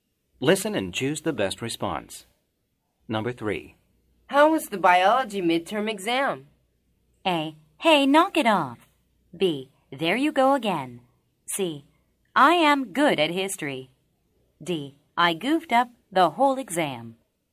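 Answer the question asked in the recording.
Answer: D: I goofed up the whole exam.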